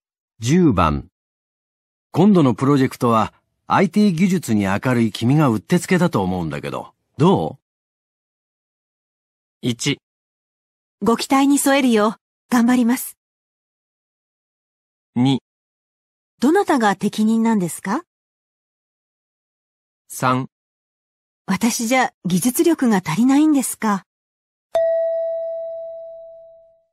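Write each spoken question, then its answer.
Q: 今度のプロジェクトは、IT 技術に明るい君がうってつけだと思うんだけど、どう?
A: 1: ご期待に添えるよ、頑張ります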